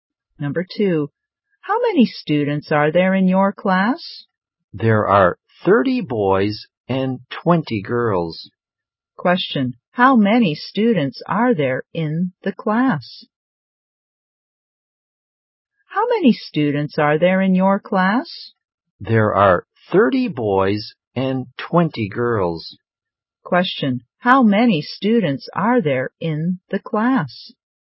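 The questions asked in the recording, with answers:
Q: How many students are there in the class?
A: 50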